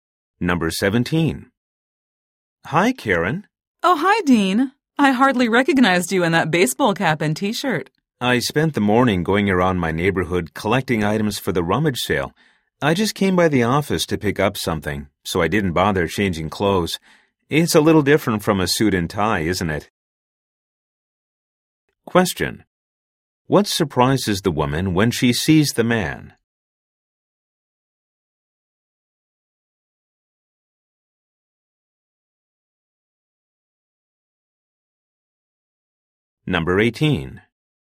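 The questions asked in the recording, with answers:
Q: What surprises the woman when she sees the man?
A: He is wearing casual clothes (baseball cap and T-shirt) instead of a suit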